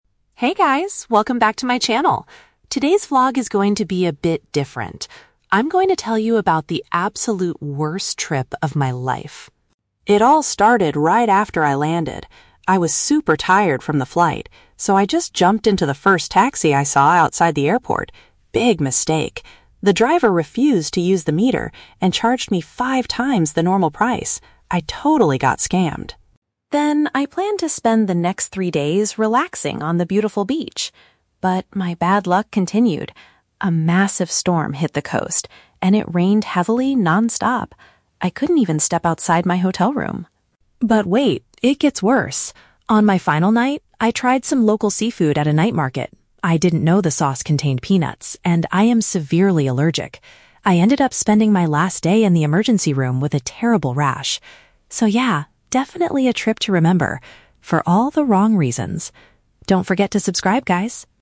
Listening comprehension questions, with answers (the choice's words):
Listen to the travel vlogger talking about her recent trip. Choose the correct answer (A, B, or C) for each question.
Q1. What happened right after the vlogger arrived at her destination?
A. She lost her luggage inside a taxi.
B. She paid too much money for her ride.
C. She could not find an available taxi.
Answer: She paid too much money for her ride.

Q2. Why couldn't the vlogger enjoy the beach?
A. The weather was extremely bad during her stay.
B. Her hotel was located too far from the coast.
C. She was too exhausted from her long flight.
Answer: The weather was extremely bad during her stay.

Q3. What caused the vlogger to go to the hospital?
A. She got a stomach bug from drinking dirty water.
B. She injured herself while exploring the night market.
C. She ate a dish with an ingredient her body reacts badly to.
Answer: She ate a dish with an ingredient her body reacts badly to.

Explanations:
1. The vlogger says the taxi driver "charged me five times the normal price" and she "got scammed." This means she paid too much money.
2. She mentions that a "massive storm hit the coast" and it "rained heavily non-stop." Option (A) uses synonyms to describe this terrible weather.
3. She says the food "contained peanuts" and she is "severely allergic." An allergy means your body reacts badly to a specific ingredient.

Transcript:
Vlogger: Hey guys, welcome back to my channel! Today's vlog is going to be a bit different. I'm going to tell you about the absolute worst trip of my life.
It all started right after I landed. I was super tired from the flight, so I just jumped into the first taxi I saw outside the airport. Big mistake! The driver refused to use the meter and charged me five times the normal price. I totally got scammed.
Then, I planned to spend the next three days relaxing on the beautiful beach. But, my bad luck continued. A massive storm hit the coast, and it rained heavily non-stop. I couldn't even step outside my hotel room!
But wait, it gets worse. On my final night, I tried some local seafood at a night market. I didn't know the sauce contained peanuts, and I am severely allergic! I ended up spending my last day in the emergency room with a terrible rash. So yeah, definitely a trip to remember... for all the wrong reasons! Don't forget to subscribe, guys!